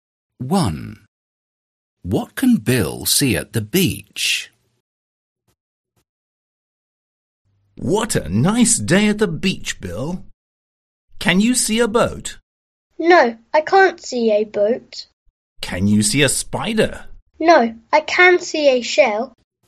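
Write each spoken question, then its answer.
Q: What can Bill see at the beach?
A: A shell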